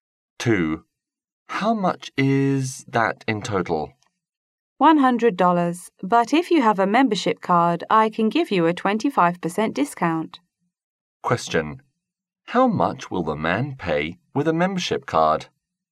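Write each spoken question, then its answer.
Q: How much will the man pay with a membership card?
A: $75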